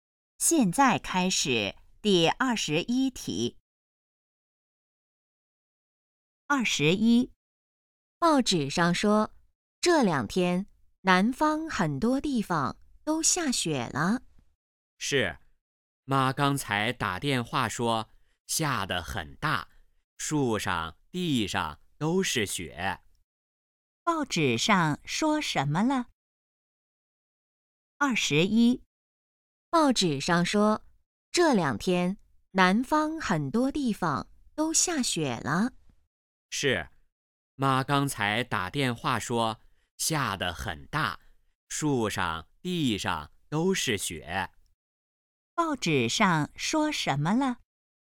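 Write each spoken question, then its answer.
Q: 报纸上说什么了?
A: 南方很多地方下雪了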